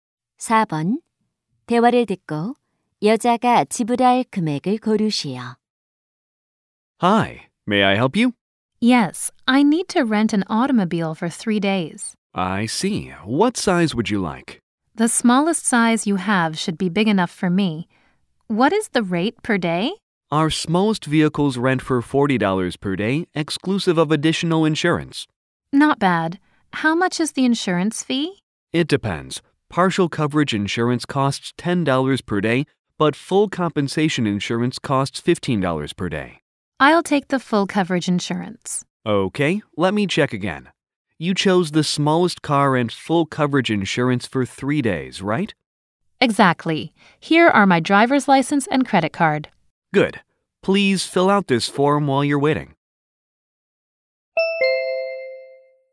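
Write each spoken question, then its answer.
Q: 대화를 듣고 여자가 지불할 금액을 고르시오.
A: $165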